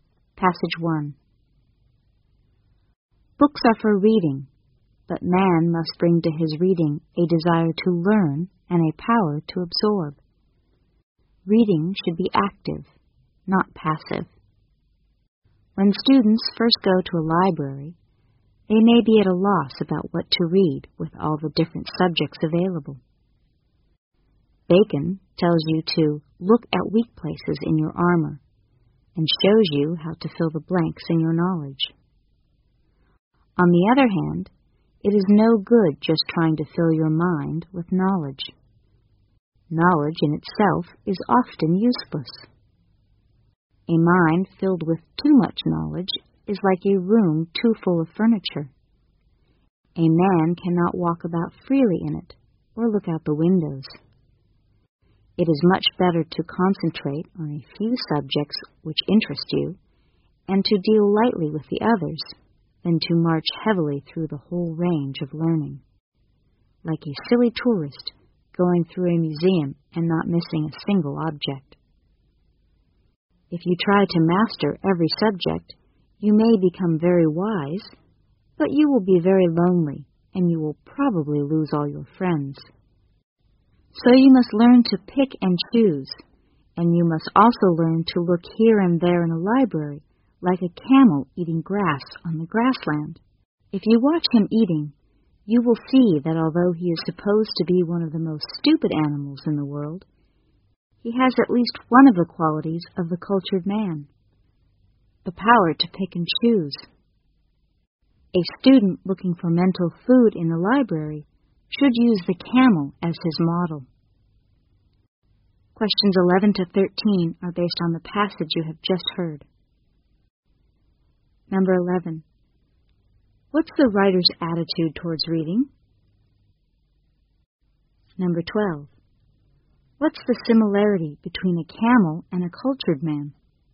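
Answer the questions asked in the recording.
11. Reading should be active and selective, not passive
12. Both have the power to pick and choose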